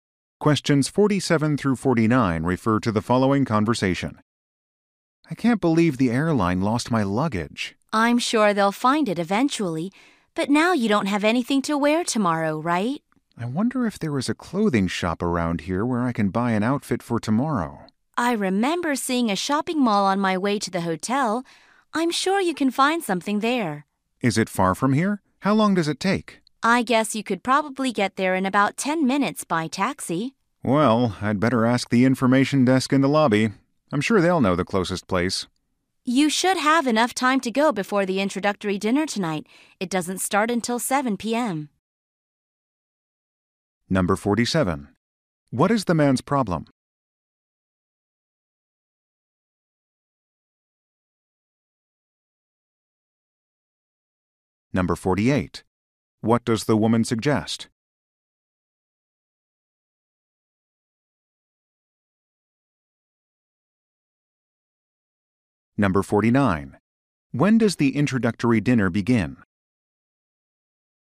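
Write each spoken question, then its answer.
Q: What is the man's problem?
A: The airline lost his luggage

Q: When does the introductory dinner begin?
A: 7 p.m.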